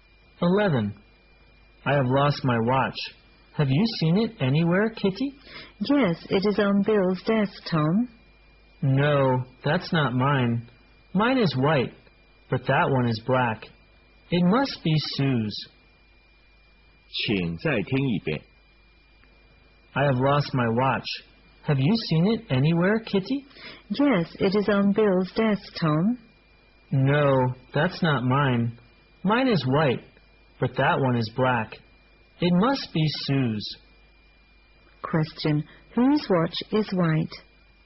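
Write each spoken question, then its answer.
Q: whose watch is white?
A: Tom's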